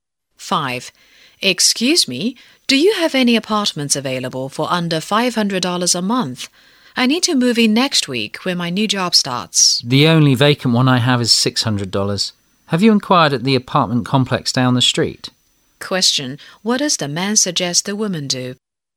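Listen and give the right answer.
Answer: Ask at the apartment complex down the street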